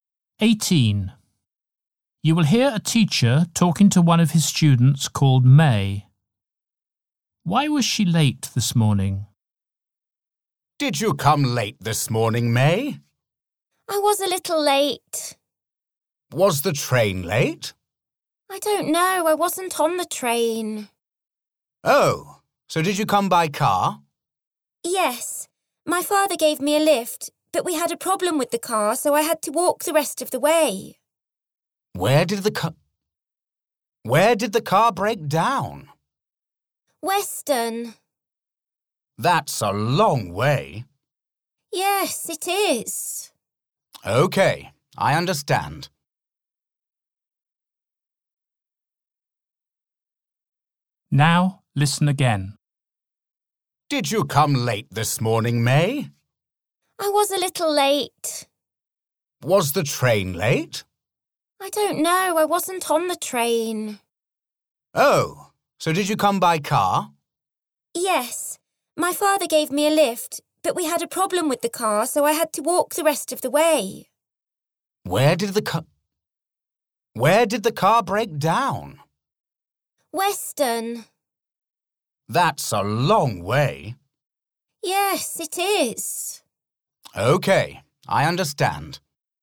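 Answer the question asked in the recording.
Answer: Her father's car broke down and she had to walk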